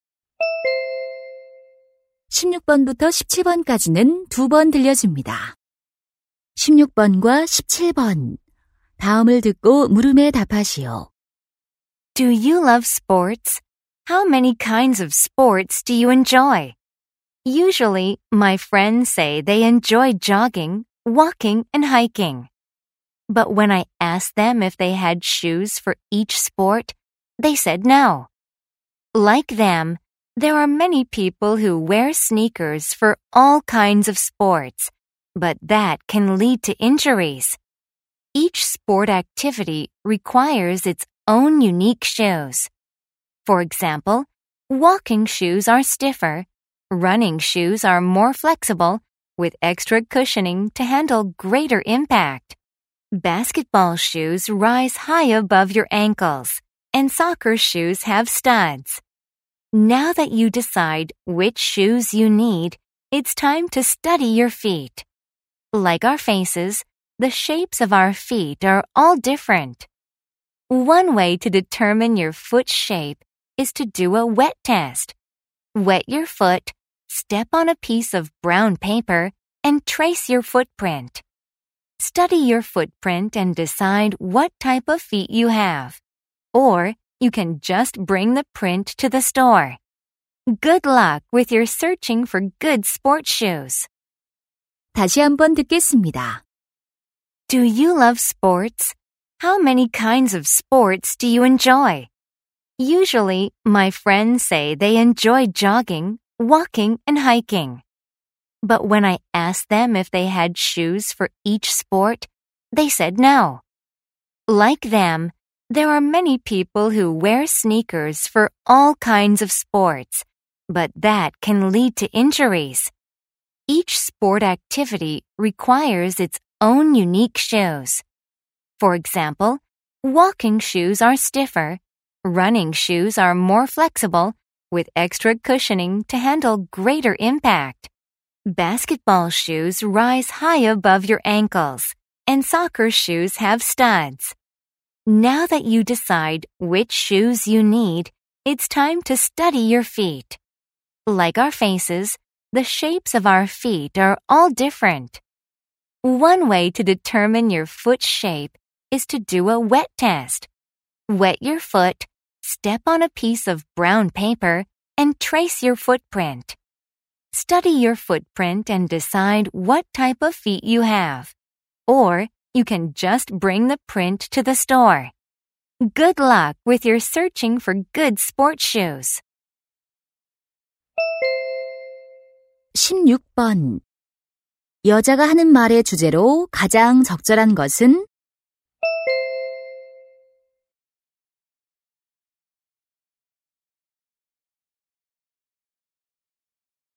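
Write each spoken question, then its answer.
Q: 여자가 하는 말의 주제로 가장 적절한 것은?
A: 운동에 맞는 운동화 고르는 법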